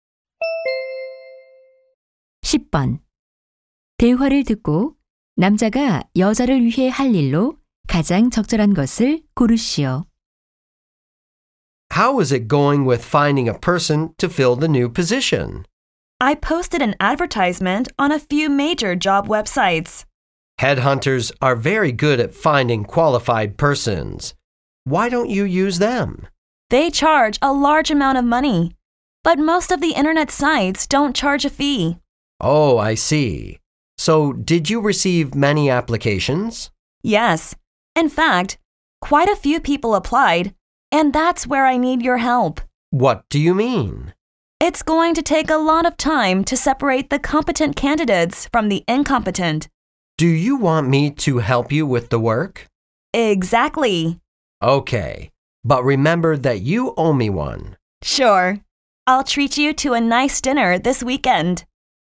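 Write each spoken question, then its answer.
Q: 대화를 듣고 남자가 여자를 위해 할 일로 가장 적절한 것을 고르시오.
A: 지원자 선별을 도와주기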